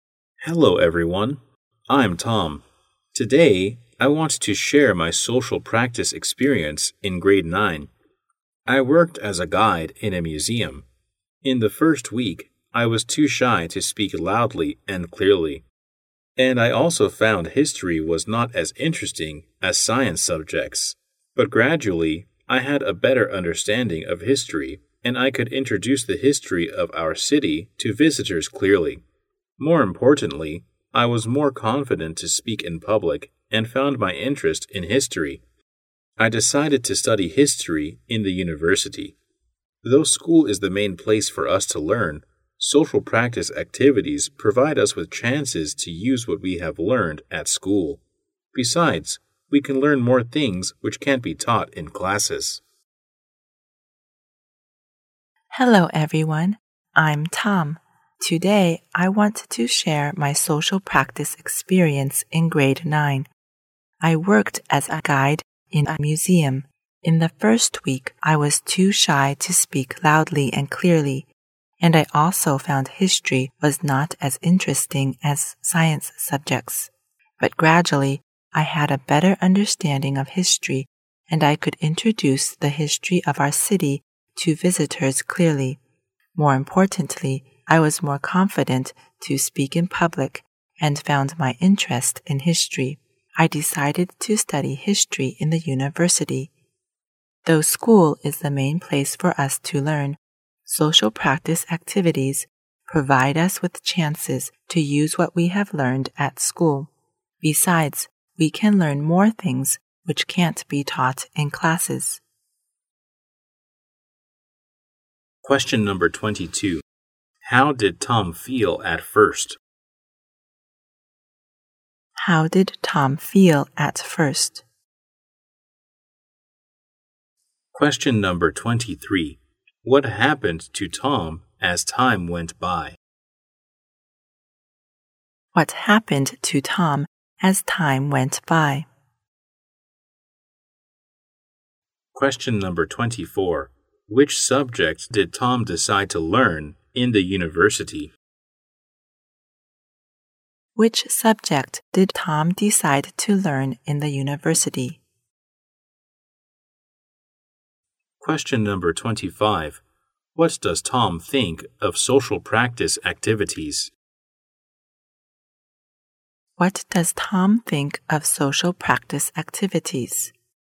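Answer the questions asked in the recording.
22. Shy
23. He became more confident and found his interest in history
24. History
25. They give chances to use what we learn at school and teach things classes can't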